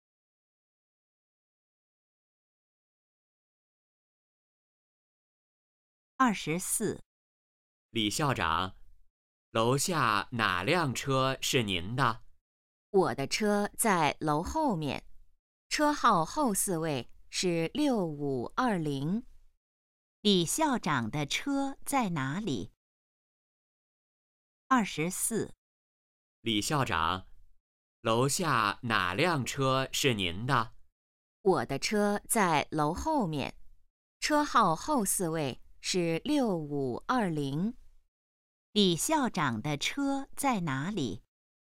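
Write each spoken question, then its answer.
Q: 李校长的车在哪里?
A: 在楼后面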